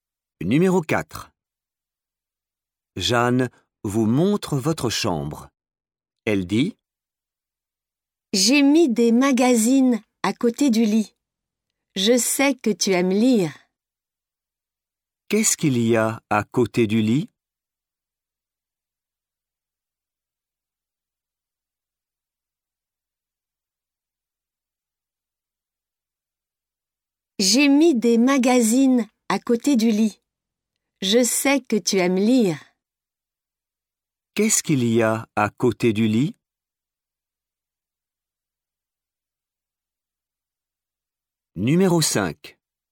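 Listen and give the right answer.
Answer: des magazines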